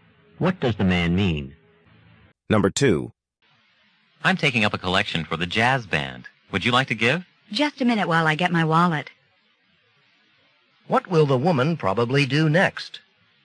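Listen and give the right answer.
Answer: Get her wallet and give money to the jazz band collection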